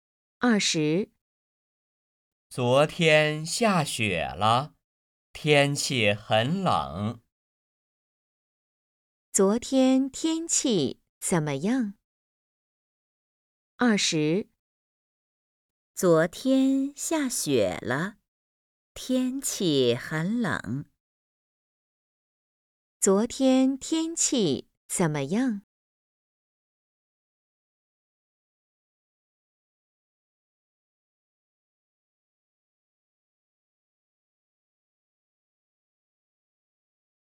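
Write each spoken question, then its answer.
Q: 昨天天气怎么样?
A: 下雪了,很冷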